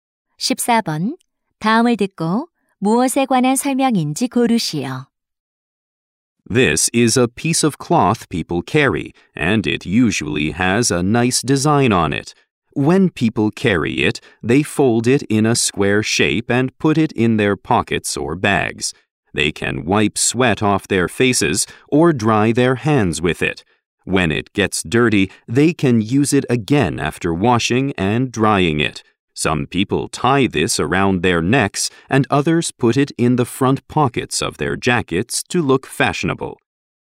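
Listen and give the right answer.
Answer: 손수건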